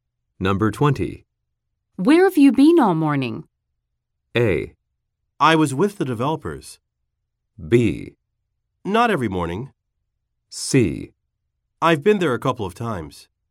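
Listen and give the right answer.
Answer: A: I was with the developers.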